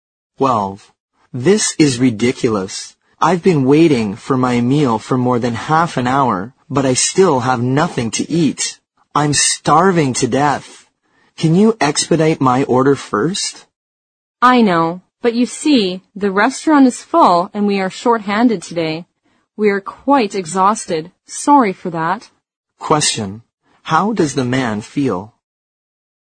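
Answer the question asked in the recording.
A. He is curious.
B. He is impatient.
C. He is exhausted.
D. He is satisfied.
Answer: B. He is impatient.

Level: 六级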